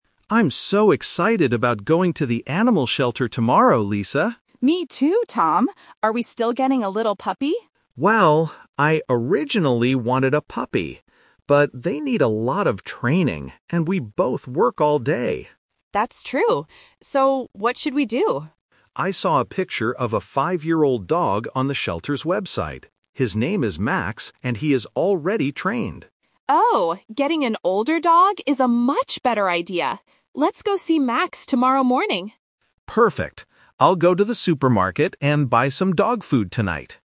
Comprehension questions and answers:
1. What kind of dog are they going to adopt?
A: A five-year-old dog.

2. Why did the man change his mind about getting a puppy?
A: Because they don't have time to train a puppy.

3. What is Tom going to do tonight?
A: Buy food for the dog.

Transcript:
Tom: I'm so excited about going to the animal shelter tomorrow, Lisa.
Lisa: Me too, Tom! Are we still getting a little puppy?
Tom: Well, I originally wanted a puppy. But they need a lot of training, and we both work all day.
Lisa: That's true. So, what should we do?
Tom: I saw a picture of a five-year-old dog on the shelter's website. His name is Max, and he is already trained.
Lisa: Oh, getting an older dog is a much better idea! Let's go see Max tomorrow morning.